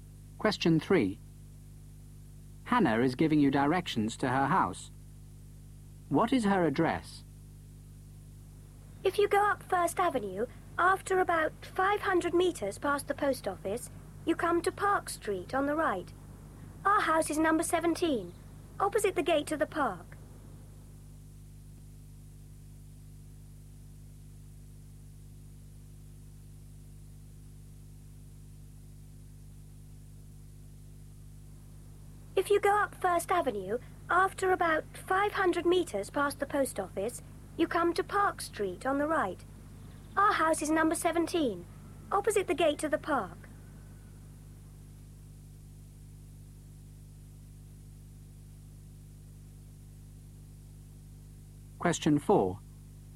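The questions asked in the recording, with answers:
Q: What is her address?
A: 17 Park Street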